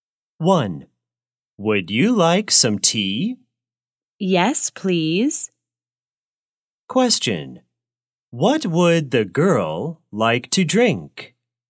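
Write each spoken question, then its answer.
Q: What would the girl like to drink?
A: tea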